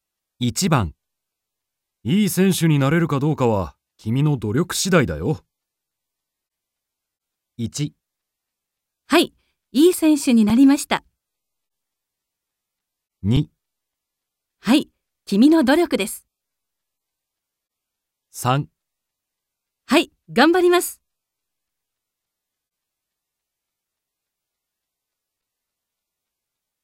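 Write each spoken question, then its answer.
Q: いい選手になれるかどうかは、君の努力次第だよ。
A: 3: はい、頑張ります。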